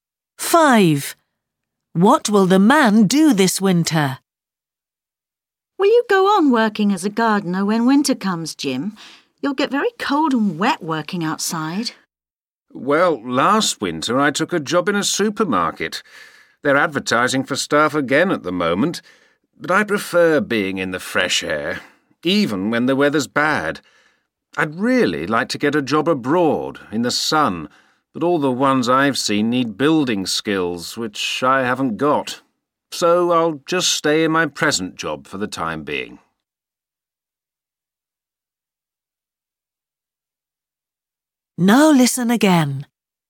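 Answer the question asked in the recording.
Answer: Keep working as a gardener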